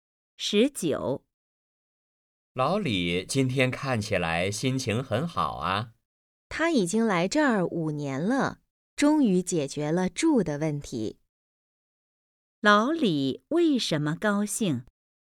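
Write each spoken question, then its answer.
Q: 老李为什么高兴?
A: 终于解决了住的问题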